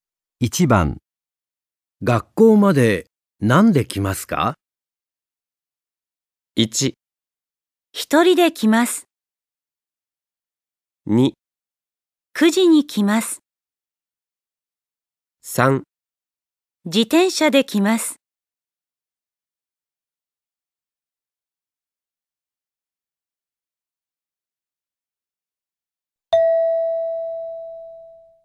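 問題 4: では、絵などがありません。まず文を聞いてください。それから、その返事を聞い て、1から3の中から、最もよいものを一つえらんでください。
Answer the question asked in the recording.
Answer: 自転車で来ます。

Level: N5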